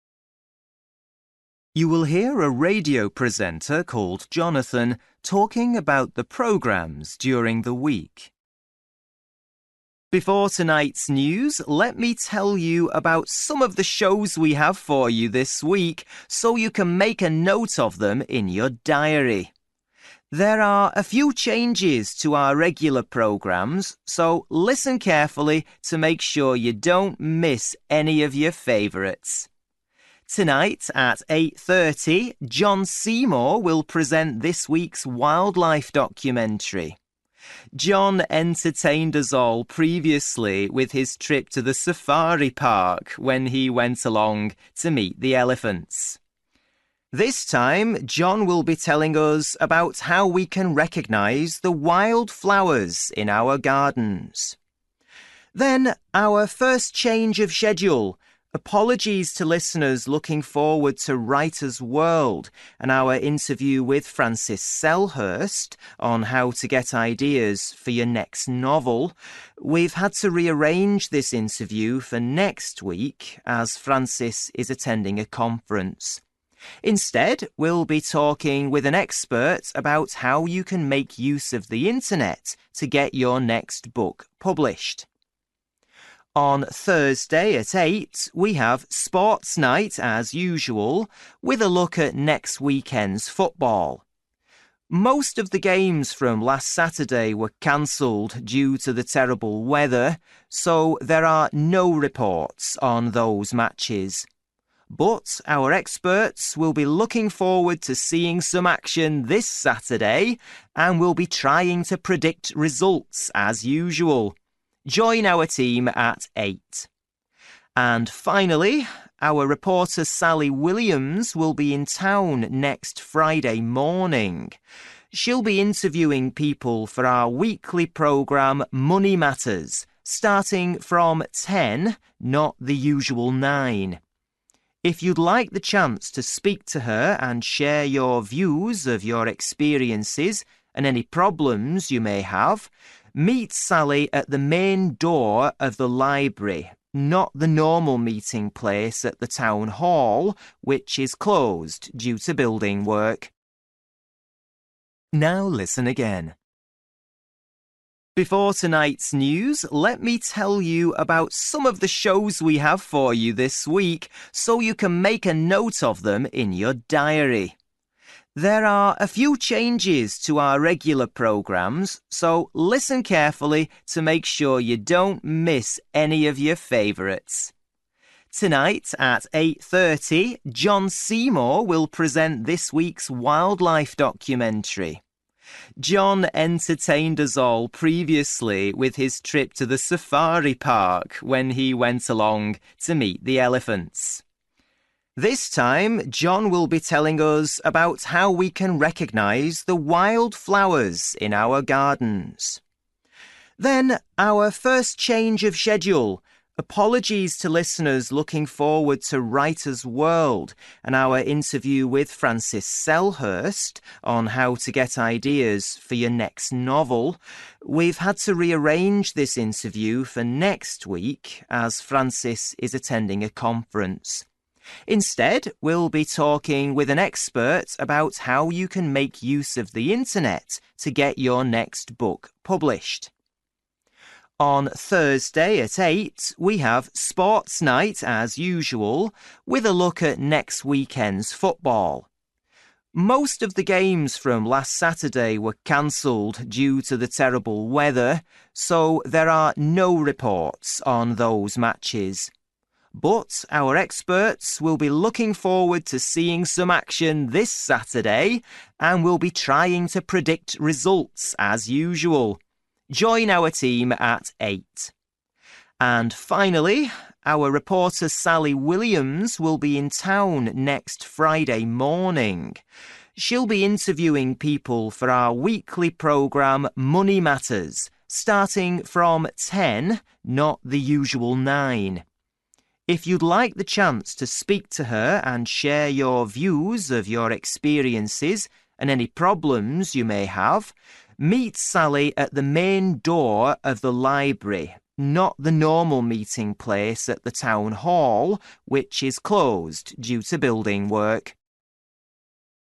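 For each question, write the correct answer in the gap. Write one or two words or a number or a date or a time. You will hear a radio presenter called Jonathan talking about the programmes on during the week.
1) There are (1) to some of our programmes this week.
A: changes

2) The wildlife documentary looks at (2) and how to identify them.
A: wildflowers

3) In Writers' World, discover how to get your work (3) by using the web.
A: published

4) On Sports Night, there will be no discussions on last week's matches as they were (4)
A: cancelled

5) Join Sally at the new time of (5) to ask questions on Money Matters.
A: 10

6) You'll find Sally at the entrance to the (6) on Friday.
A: library

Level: Luyện nghe trình độ B1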